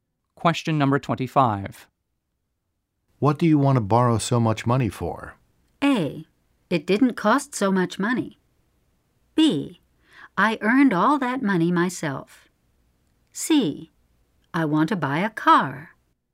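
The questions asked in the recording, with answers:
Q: What do you want to borrow so much money for?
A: C: I want to buy a car.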